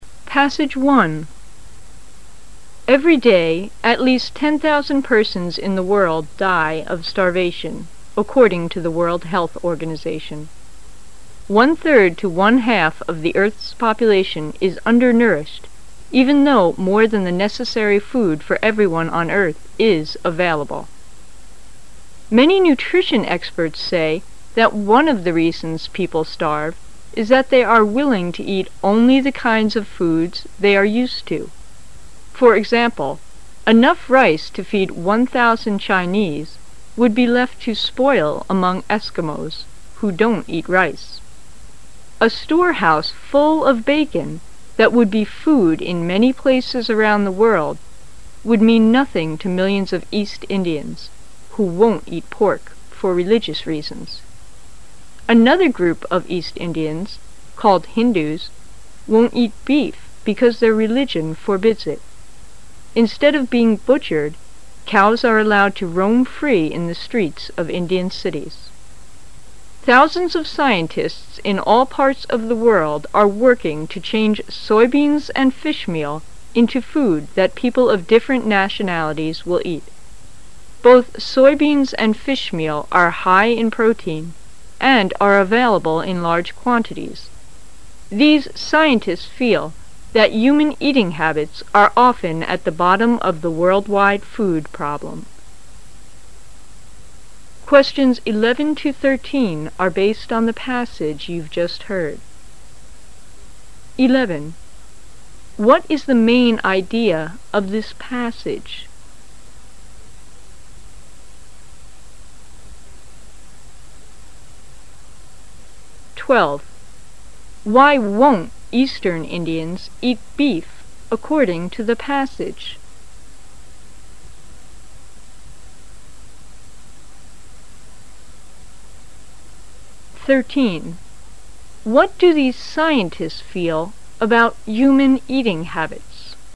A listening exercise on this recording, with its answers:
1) Why won't Eastern Indians eat beef according to the passage?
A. Because cows roam the street.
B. Because they are Fast Indians.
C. Because they don't like beef.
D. Because their religion forbids it.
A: Because their religion forbids it.

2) What do these scientists feel about human eating habits?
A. They are the main cause of the world-wide food problem.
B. They are the bad quality of the world-wide food problem.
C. They are at the low level of the world-wide food problem.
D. They are the less important factor of the world-wide problem.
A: They are the main cause of the world-wide food problem.

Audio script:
[解析] 11-13 Every day at least 10,000 persons in the world die of starvation, according to the World Health Organization. One third to one-half of the earth's population is under nourished even though more than the necessary food for everyone on earth is available. Many nutrition experts say that one of the reasons people starve is that they are willing to eat only the kind of foods 'they are used to. For example, enough rice to feed 1,000 Chinese would be left to spoil among Eskimos, who don't eat rice. A store house full of bacon that would be food in many places around the world would mean nothing to millions of East Indians, who won't eat pork for religious reasons. Another group of East Indians, called Hindus, won't eat beef because their religion forbids it. Instead of being butchered, cows are allowed to roam free in the streets of Indian cities. Thousands of scientists in all parts of the world are working to change soybeans and fish meal into food that people of different nationalities will eat. Both soybeans and fish meal are high in protein and are available in large quantities. These scientists feel that human eating habits are often at the bottom of the worM-wide food problem. What is the main idea of this passage?

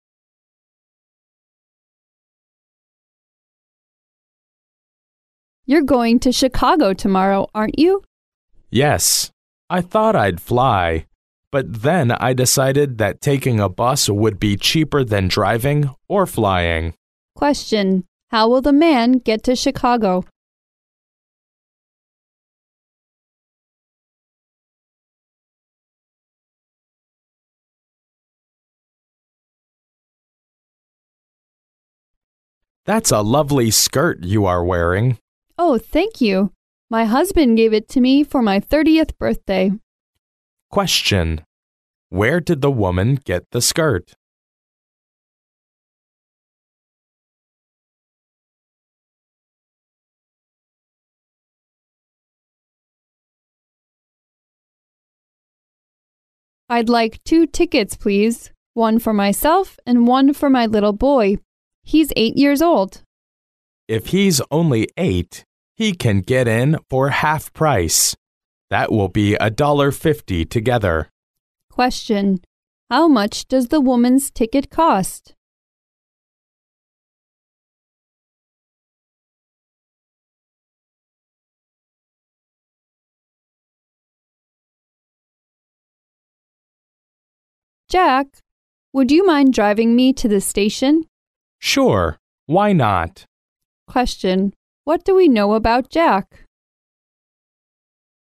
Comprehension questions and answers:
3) Where did the woman get the skirt?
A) She paid $30 for the skirt.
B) She bought the skirt on her 30th birthday.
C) Her friend sent it to her as a birthday gift.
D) Her husband presented it to her as a gift.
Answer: Her husband presented it to her as a gift.

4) How much does the woman's ticket cost?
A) Fifty cents.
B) Eighty cents.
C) One dollar.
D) Seventy-five cents.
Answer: One dollar.

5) What do we know about jack?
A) He refused to drive her.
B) He has a new car.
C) He forgot his drive license.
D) He is glad to drive her.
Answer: He is glad to drive her.

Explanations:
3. 题目问"女士从哪得到的裙子"。由女士的回答"My husband gave it to me for my 30th birthday."可知,选项D为正确答案。
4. 题目问"这位女士的票价为多少"。由男士的说法"If he's only eight, he can get in for half price. That will be a dollar fifty together."可知,1.5倍的成人票价为一美元五十美分,计算可知,女士个人的票价为一美元,故选项C为正确答案。

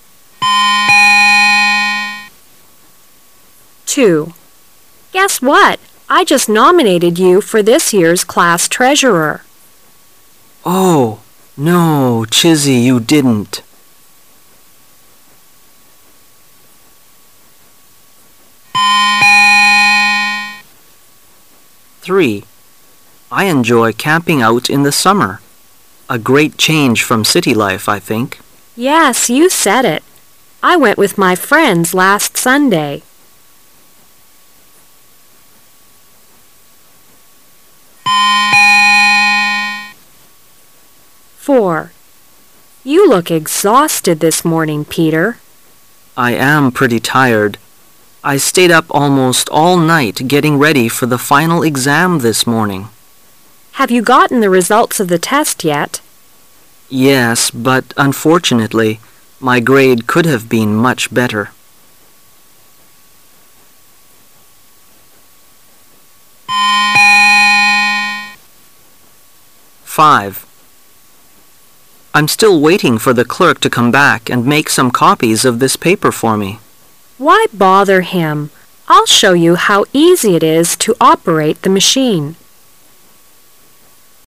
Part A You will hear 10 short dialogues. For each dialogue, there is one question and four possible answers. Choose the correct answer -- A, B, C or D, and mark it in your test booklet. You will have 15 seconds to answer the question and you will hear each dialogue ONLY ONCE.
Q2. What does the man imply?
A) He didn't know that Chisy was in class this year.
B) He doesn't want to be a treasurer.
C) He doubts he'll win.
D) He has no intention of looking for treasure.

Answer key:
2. He doesn't want to be a treasurer.

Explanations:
W: Guess what? I just nominated you for this year's class treasurer. M: Oh! No, Chisy you didn't.

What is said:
[解析] M: I enjoy camping out in the summer. A great change from city life, I think. W: Yes, you said it. I went with my friends last Sunday.
[解析] W: You look exhausted this morning, Peter. M: I am pretty, tired. I stayed up almost all night getting ready for the final exam this morning. W: Have you gotten the results of the test yet? M: Yes, but unfortunately , my grade could have been much better.
[解析] M: I'm still waiting for the clerk to come back and make some copies of this paper for me. W: Why bother him? I'll show you how easy it is to operate the machine.

